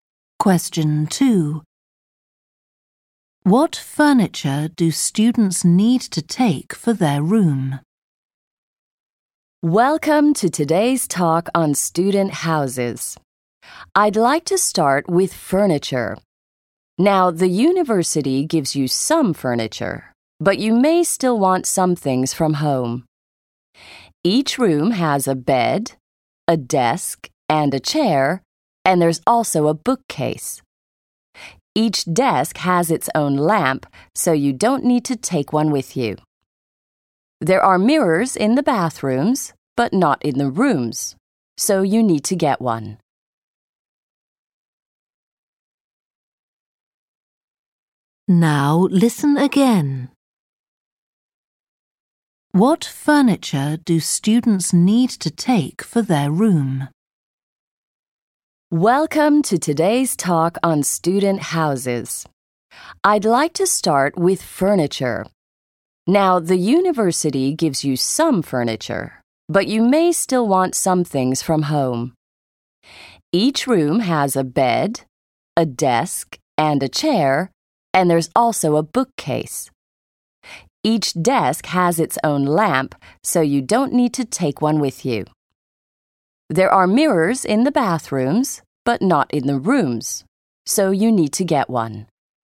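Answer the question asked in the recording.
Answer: A mirror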